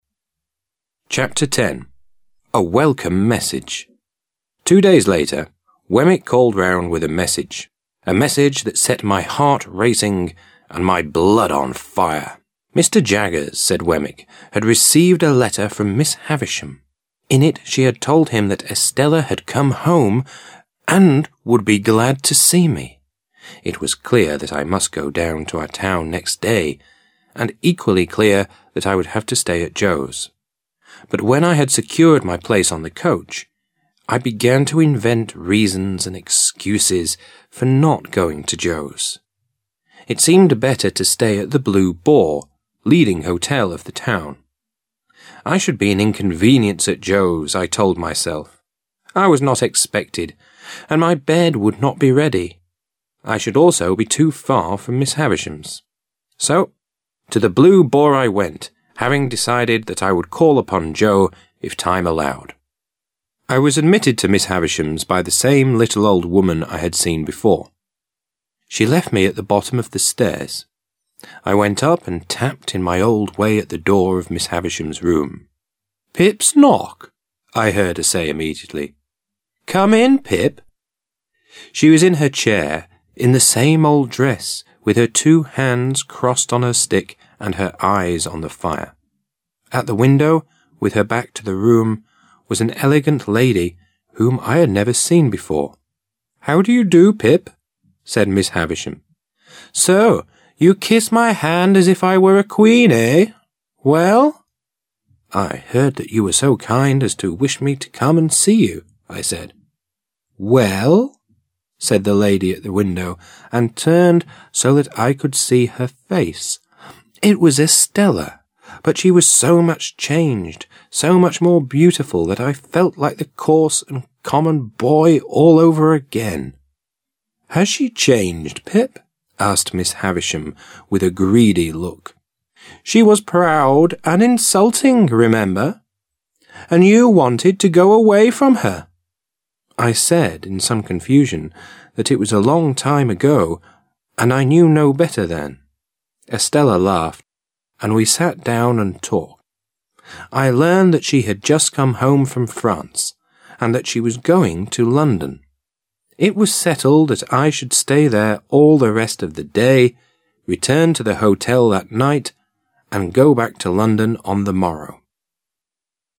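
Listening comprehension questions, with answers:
Task 1. You are going to listen to the 1st part of the 10th chapter. Fill in the gaps with the missing words that are given in the table.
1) Two days later, Wemmick ______________________________________________— a message that _______ my heart racing and my blood ______________.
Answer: called round with a message; set; on fire

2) In it she had told him that Estella had come home and would be _____________ to see me.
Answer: glad

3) It was clear that I must ______________to our town next day, and equally clear that I would have to stay at Joe's.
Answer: go down

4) But when I had ______________ my place on the coach, I began ________________________________and excuses for not going to Joe's; it seemed better to stay at the Blue Boar, leading hotel of the town.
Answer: secured; to invent reasons

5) I should at Joe's, I told myself; I was not expected and my bed would not be ready;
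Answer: be an inconvenience

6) So, to the Blue Boar I went, having decided that I would ___________________Joe if time allowed.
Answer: call upon

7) She left me ________ the bottom of the stairs.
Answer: at

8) She was in her chair, in the same old dress, with her two hands _______________________her stick and her eyes on the fire.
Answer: crossed on

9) "So you kiss my hand as if I were a queen, __________? Well?"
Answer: eh

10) But she was so much changed, so much more beautiful, that I felt like the _________________ and common boy ____________________.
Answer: coarse; all over again

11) I said, in some ____________________, that it was a long time ago and I knew no better then.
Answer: confusion

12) It was settled that I should stay there all the rest of the day, return to the hotel that night, and go back to London ___________________________.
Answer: on the morrow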